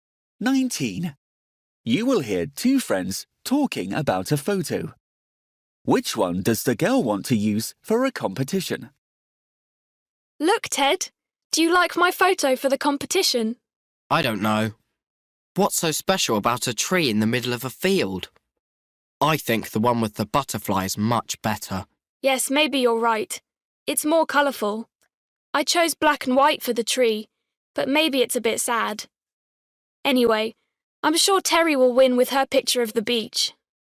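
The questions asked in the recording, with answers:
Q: Which one does the girl want to use for a competition?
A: the one with the butterfly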